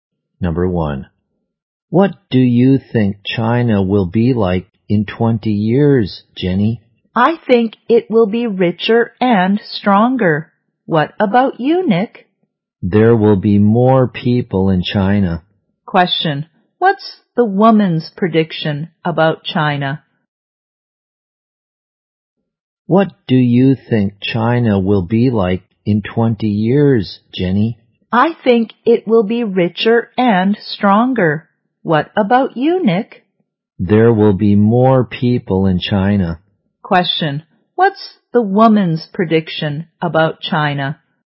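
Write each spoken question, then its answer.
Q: what's the woman's prediction about China?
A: It will be richer and stronger.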